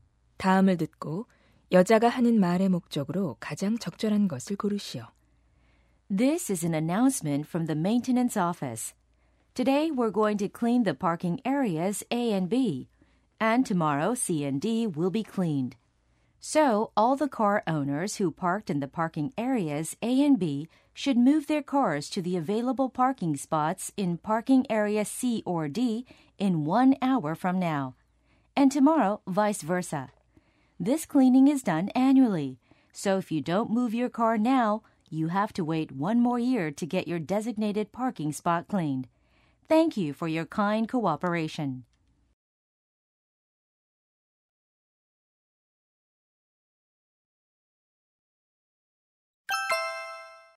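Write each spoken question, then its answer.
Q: 다음을 듣고 여자가 하는 말의 목적으로 가장 적절한 것을 고르시오.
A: 주차장 청소를 위해 차량 이동을 요청하려고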